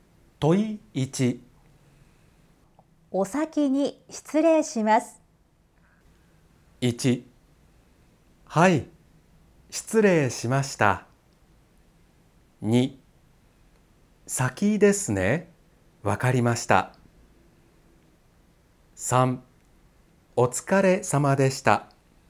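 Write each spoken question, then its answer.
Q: お先に失礼します。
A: 3: お疲れ様でした。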